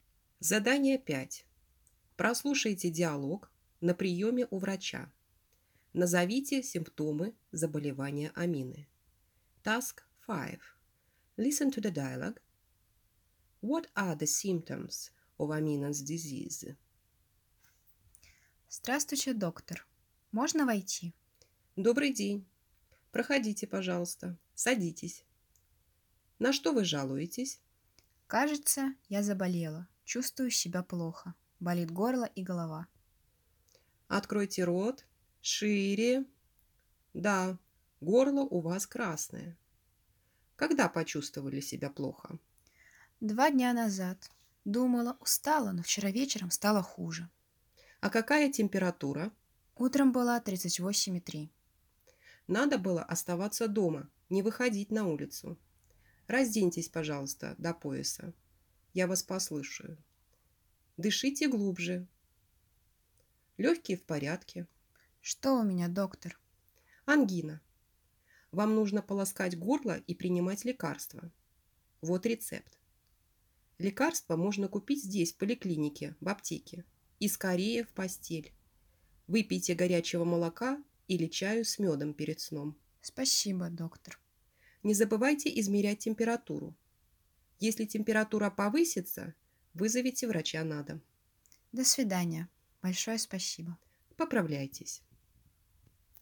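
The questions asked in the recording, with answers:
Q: Назовите симптомы заболевания Амины.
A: Болит горло и голова, горло красное, температура 38,3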